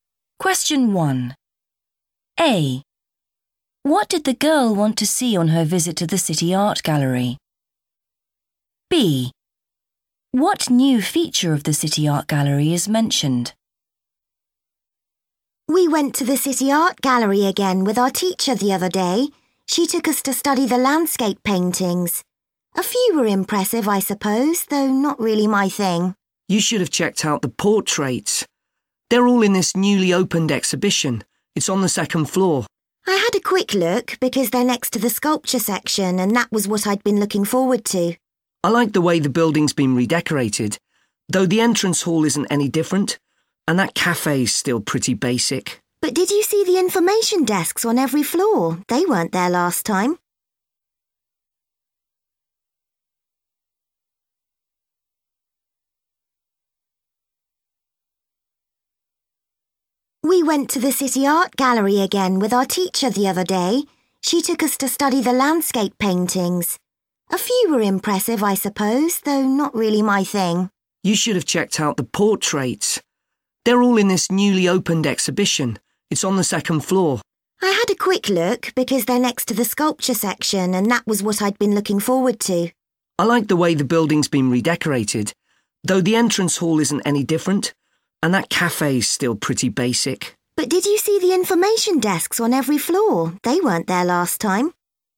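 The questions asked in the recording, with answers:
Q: What did the girl want to see on her visit to the City Art Gallery?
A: the sculpture section

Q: What new feature of the City Art Gallery is mentioned?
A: information desks on every floor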